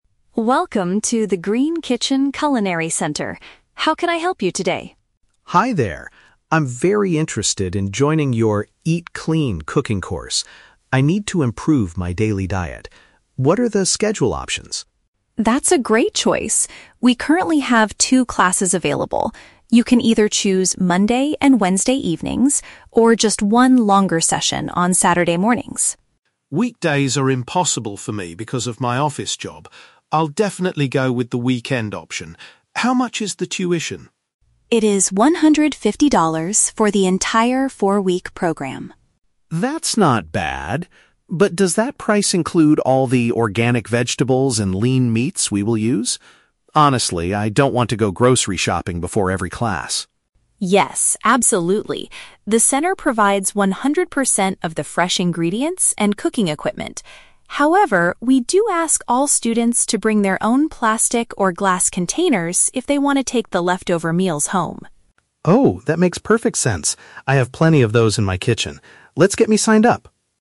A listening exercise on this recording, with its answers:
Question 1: When will the customer attend the cooking lessons?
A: At the beginning of the weekend.

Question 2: What is the customer's main concern about the course fee?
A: Whether it covers the cost of the healthy food supplies.

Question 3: What must the student bring from home to the cooking class?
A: Something to store the unconsumed food in.

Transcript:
Mia: Welcome to the Green Kitchen Culinary Center. How can I help you today?
Alex: Hi there. I'm very interested in joining your "Eat Clean" cooking course. I need to improve my daily diet. What are the schedule options?
Mia: That's a great choice! We currently have two classes available. You can either choose Monday and Wednesday evenings, or just one longer session on Saturday mornings.
Alex: Weekdays are impossible for me because of my office job. I'll definitely go with the weekend option. How much is the tuition?
Mia: It is $150 for the entire four-week program.
Alex: That's not bad. But does that price include all the organic vegetables and lean meats we will use? Honestly, I don't want to go grocery shopping before every class.
Mia: Yes, absolutely. The center provides one hundred percent of the fresh ingredients and cooking equipment. However, we do ask all students to bring their own plastic or glass containers if they want to take the leftover meals home.
Alex: Oh, that makes perfect sense. I have plenty of those in my kitchen. Let's get me signed up!